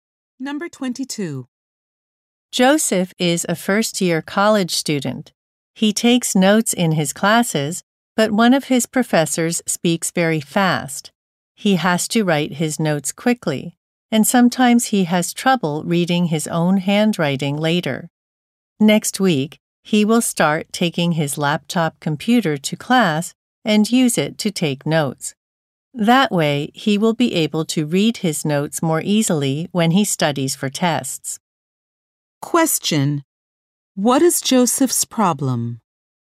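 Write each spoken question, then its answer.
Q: Question: What is Joseph's problem?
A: He can't read his own handwritten notes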